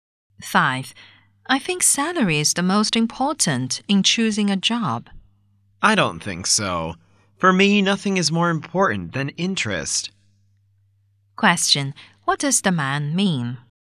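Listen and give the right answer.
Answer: Interest is more important than salary in choosing a job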